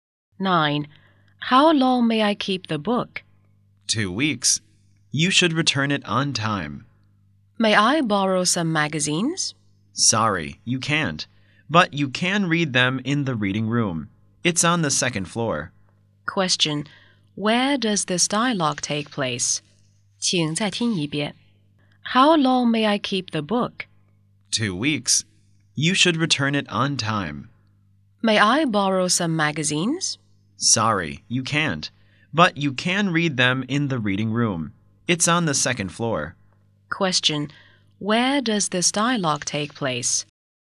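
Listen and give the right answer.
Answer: In a library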